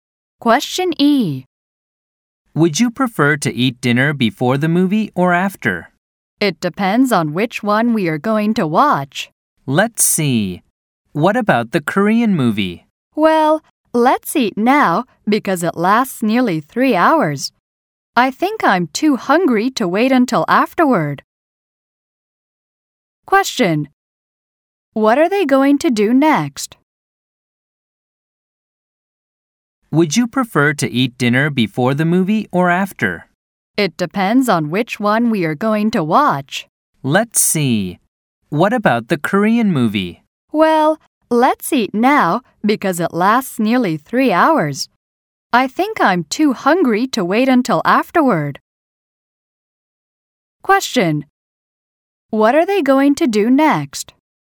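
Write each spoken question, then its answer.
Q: What are they going to do next?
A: Eat dinner.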